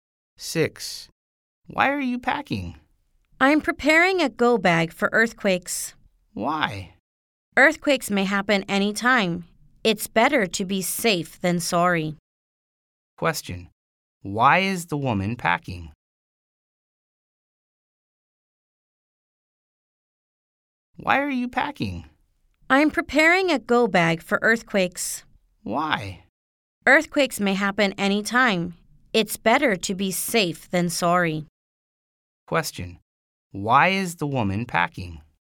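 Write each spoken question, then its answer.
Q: Why is the woman packing?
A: She's preparing a go bag for earthquakes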